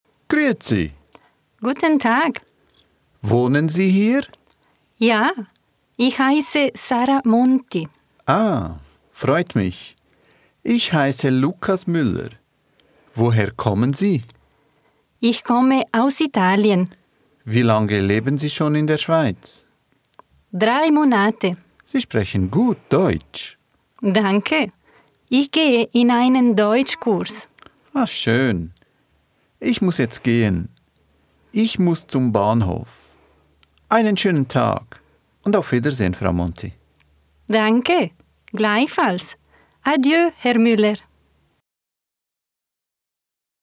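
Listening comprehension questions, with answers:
Wählen Sie die passende Anwort.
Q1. Woher kommt Sara Monti? (Darimana asal Sara Monti?)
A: aus Italien

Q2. Wohin geht Müller? (Kemana Müller pergi?)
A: zum Bahnhof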